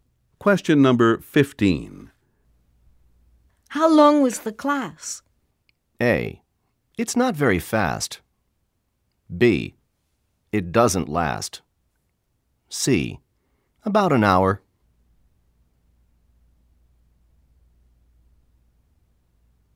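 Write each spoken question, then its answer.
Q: How long was the class?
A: C: About an hour.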